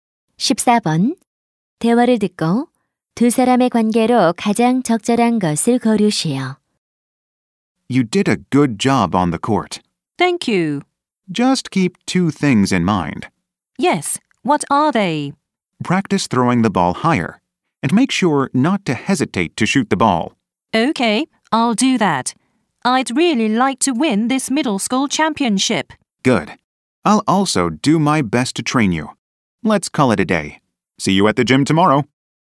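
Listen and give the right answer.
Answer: 농구 코치와 선수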